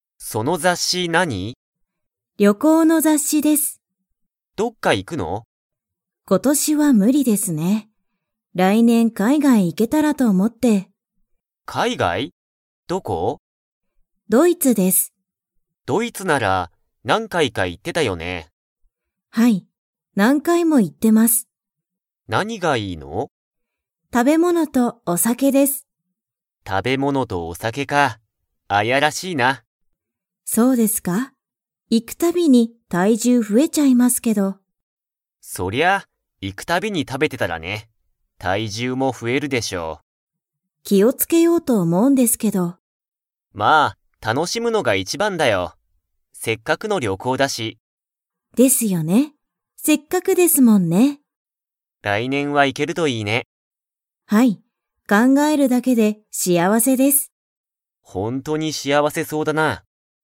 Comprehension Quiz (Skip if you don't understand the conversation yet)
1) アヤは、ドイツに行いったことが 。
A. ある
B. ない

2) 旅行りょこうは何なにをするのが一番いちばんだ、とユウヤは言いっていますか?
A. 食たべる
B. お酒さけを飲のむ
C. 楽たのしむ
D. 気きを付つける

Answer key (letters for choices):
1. A
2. C

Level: Level 4